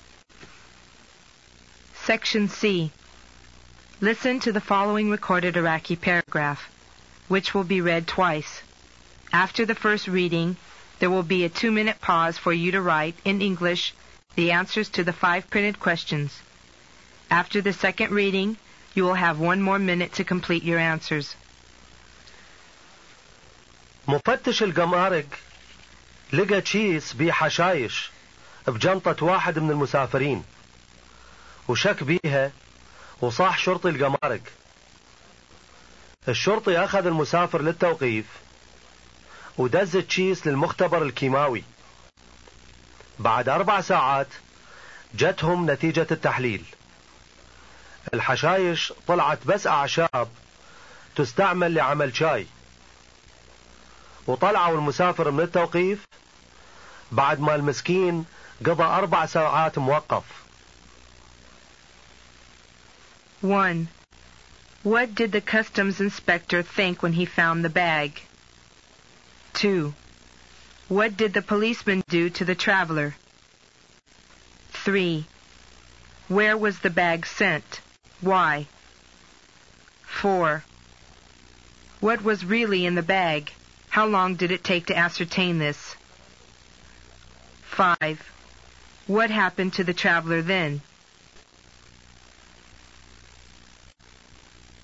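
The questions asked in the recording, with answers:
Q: What did the customs inspector think when he found the bag?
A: He suspected it contained drugs (grass/weeds).

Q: What did the policeman do to the traveler?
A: He took him into custody.

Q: Where was the bag sent?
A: To the chemical laboratory.

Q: What was really in the bag?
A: Herbs used for making tea.

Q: How long did it take to ascertain this?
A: Four hours.

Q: What happened to the traveler then?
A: He was released from custody after four hours.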